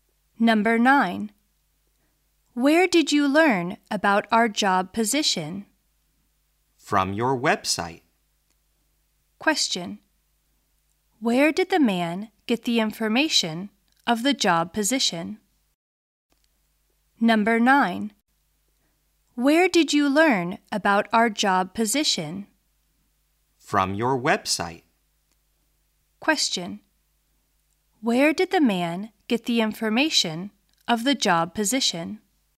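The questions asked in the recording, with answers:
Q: Where did the man get the information of the job position?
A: From the company's website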